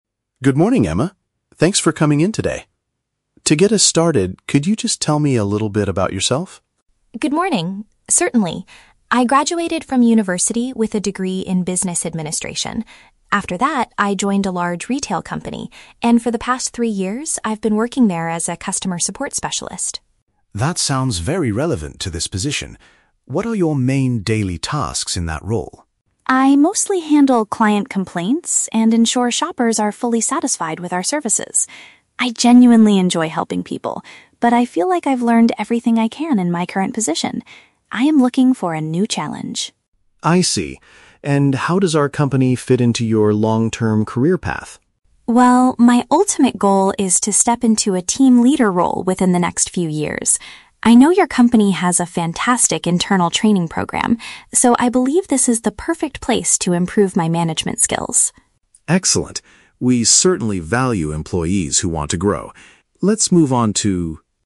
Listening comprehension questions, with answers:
Listen to a job interview conversation between a manager and a candidate. Choose the best answer (A, B, or C) for each question.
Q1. What is Emma's educational background?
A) She studied business management at the university level.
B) She recently completed a short course in customer service.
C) She is currently getting a degree in retail marketing.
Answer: She studied business management at the university level.

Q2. What has Emma been doing at work for the last three years?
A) Managing a small retail store in her hometown.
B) Dealing with unhappy buyers and resolving their issues.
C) Creating training programs for new support staff.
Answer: Dealing with unhappy buyers and resolving their issues.

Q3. What is Emma's future professional goal?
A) To become a full-time professional corporate trainer.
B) To get a position where she can guide and direct a group.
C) To open her own independent retail business one day.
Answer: To get a position where she can guide and direct a group.

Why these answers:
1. Emma says she "graduated from university with a degree in Business Administration." Paraphrasing: degree in Business Administration = studied business management.
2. Emma states that she mostly handles "client complaints" and ensures shoppers are satisfied. Paraphrasing: client complaints = unhappy buyers; ensure they are satisfied = resolving their issues.
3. Emma mentions her ultimate goal is to "step into a team leader role." Paraphrasing: team leader role = a position where she can guide and direct a group.

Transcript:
Manager: Good morning, Emma. Thanks for coming in today. To get us started, could you just tell me a little bit about yourself?
Emma: Good morning. Certainly. I graduated from university with a degree in Business Administration. After that, I joined a large retail company, and for the past three years, I've been working there as a customer support specialist.
Manager: That sounds very relevant to this position. What are your main daily tasks in that role?
Emma: I mostly handle client complaints and ensure shoppers are fully satisfied with our services. I genuinely enjoy helping people, but I feel like I've learned everything I can in my current position. I am looking for a new challenge.
Manager: I see. And how does our company fit into your long-term career path?
Emma: Well, my ultimate goal is to step into a team leader role within the next few years. I know your company has a fantastic internal training program, so I believe this is the perfect place to improve my management skills.
Manager: Excellent. We certainly value employees who want to grow. Let's move on to...

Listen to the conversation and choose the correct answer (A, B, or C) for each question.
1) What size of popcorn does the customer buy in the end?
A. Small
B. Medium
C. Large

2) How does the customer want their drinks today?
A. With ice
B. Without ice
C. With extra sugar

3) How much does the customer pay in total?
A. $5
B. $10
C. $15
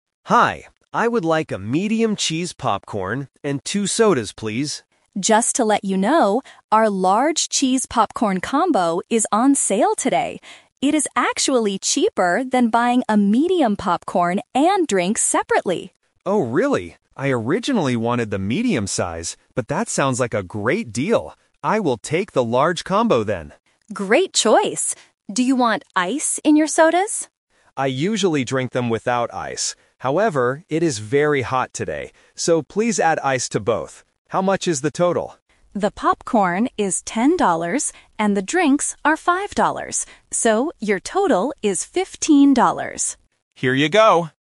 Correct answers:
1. Large
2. With ice
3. $15

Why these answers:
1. The customer says, "I originally wanted the medium size" (Option B is the trap), "but... I will take the large combo then" because it is cheaper. Option A is not mentioned.
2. The customer says, "I usually drink them without ice" (Option B is the trap). "However, it is very hot today. So, please add ice to both." Option C is not mentioned.
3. The employee breaks down the price: the popcorn is $10 (Option B is the trap) and the drinks are $5 (Option A is the trap). "So, your total is $15."

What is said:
Customer: Hi, I would like a medium cheese popcorn and two sodas, please.
Employee: Just to let you know, our large cheese popcorn combo is on sale today. It is actually cheaper than buying a medium popcorn and drinks separately.
Customer: Oh, really? I originally wanted the medium size, but that sounds like a great deal. I will take the large combo then.
Employee: Great choice. Do you want ice in your sodas?
Customer: I usually drink them without ice. However, it is very hot today. So, please add ice to both. How much is the total?
Employee: The popcorn is $10 and the drinks are $5. So, your total is $15.

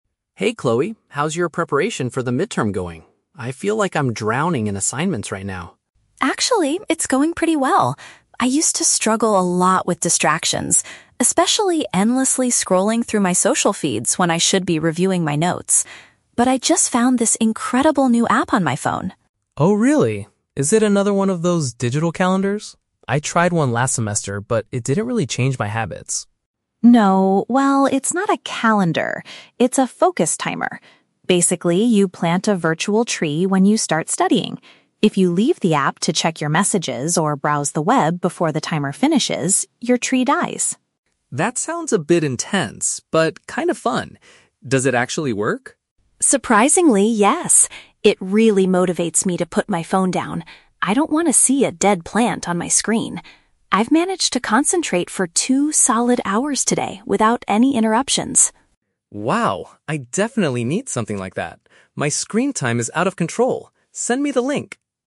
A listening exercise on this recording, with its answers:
Listen to a conversation between two classmates. For each question, choose the correct answer (A, B, or C).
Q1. What was Chloe's main problem before using the app?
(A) She couldn't organize her study schedule.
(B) She spent too much time on the internet.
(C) She had too many assignments to finish.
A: She spent too much time on the internet.

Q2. How does the new app help Chloe study?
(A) It reminds her of important exam dates.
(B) It encourages her to stay away from her phone.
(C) It blocks all incoming messages and emails.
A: It encourages her to stay away from her phone.

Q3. How does Mark feel about the app at the end of the conversation?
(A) He wants to download it to reduce his phone usage.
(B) He thinks it is too intense for him to use.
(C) He prefers using a digital calendar instead.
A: He wants to download it to reduce his phone usage.

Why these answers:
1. Chloe says she used to struggle with "endlessly scrolling through my social feeds." Option B paraphrases this perfectly. Trap A is incorrect because Mark mentions digital calendars, but Chloe says the app is not a calendar. Trap C is incorrect because having "too many assignments" is Mark's problem ("drowning in assignments"), not Chloe's.
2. Chloe states that the app "motivates me to put my phone down." Option B uses the synonym phrase "stay away from her phone." Trap A is incorrect because the app is a "focus timer," not a calendar that reminds you of dates. Trap C is a plausible distractor, but the app does not automatically block messages; it just kills the virtual tree if she leaves the app to check them.
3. At the end, Mark says, "My screen time is out of control. Send me the link!" This shows he wants to try it to reduce his phone usage (Option A). Trap B is incorrect because although he initially says "That sounds a bit intense," he immediately adds "but kind of fun" and later asks for the link. Trap C is incorrect because Mark explicitly states that he tried a calendar last semester and "it didn't really change my habits."

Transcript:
Mark: Hey Chloe, how's your preparation for the midterm going? I feel like I'm drowning in assignments right now.
Chloe: Actually, it's going pretty well! I used to struggle a lot with distractions, especially endlessly scrolling through my social feeds when I should be reviewing my notes. But I just found this incredible new app on my phone.
Mark: Oh really? Is it another one of those digital calendars? I tried one last semester, but it didn't really change my habits.
Chloe: No, well, it's not a calendar. It's a focus timer. Basically, you plant a virtual tree when you start studying. If you leave the app to check your messages or browse the web before the timer finishes, your tree dies.
Mark: That sounds a bit intense, but kind of fun. Does it actually work?
Chloe: Surprisingly, yes! It really motivates me to put my phone down. I don't want to see a dead plant on my screen. I've managed to concentrate for two solid hours today without any interruptions.
Mark: Wow, I definitely need something like that. My screen time is out of control. Send me the link!

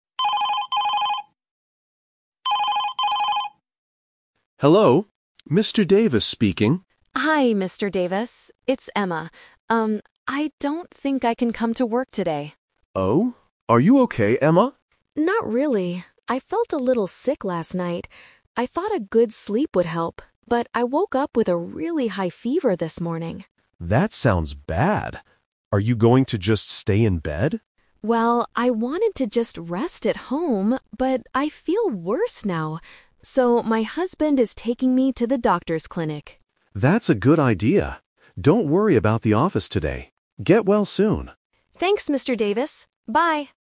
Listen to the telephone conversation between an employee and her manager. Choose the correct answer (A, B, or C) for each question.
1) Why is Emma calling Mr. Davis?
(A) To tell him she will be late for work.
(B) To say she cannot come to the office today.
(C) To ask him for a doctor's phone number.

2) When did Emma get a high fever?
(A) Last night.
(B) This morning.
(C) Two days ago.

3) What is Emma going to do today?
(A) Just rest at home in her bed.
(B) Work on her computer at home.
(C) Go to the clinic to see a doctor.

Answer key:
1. To say she cannot come to the office today.
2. This morning.
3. Go to the clinic to see a doctor.

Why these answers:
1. Emma says, "I don't think I can come to work today." She is calling to take a sick day. Trap A is wrong: She is not going to be late; she is not coming at all. Trap C is wrong: The doctor is mentioned, but she doesn't ask her manager for the doctor's number.
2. Emma clearly states, "I woke up with a really high fever this morning." Trap A is wrong (The Trap): Last night she only "felt a little sick," she didn't have a high fever yet. Trap C is wrong: "Two days ago" is not mentioned in the audio.
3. Emma says, "my husband is taking me to the doctor's clinic." Trap A is wrong (The Twist): The manager asks if she will stay in bed, and Emma says "I wanted to just rest at home, but...". She changed her plan because she feels worse. Trap B is wrong: Working from home is a plausible idea for an office worker, but it is not mentioned. The manager even says, "Don't worry about the office today."

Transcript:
Mr. Davis: Hello. Mr. Davis speaking.
Emma: Hi, Mr. Davis. It's Emma. Um, I don't think I can come to work today.
Mr. Davis: Oh? Are you okay, Emma?
Emma: Not really. I felt a little sick last night. I thought a good sleep would help, but I woke up with a really high fever this morning.
Mr. Davis: That sounds bad. Are you going to just stay in bed?
Emma: Well, I wanted to just rest at home, but I feel worse now. So, my husband is taking me to the doctor's clinic.
Mr. Davis: That's a good idea. Don't worry about the office today. Get well soon.
Emma: Thanks, Mr. Davis. Bye.

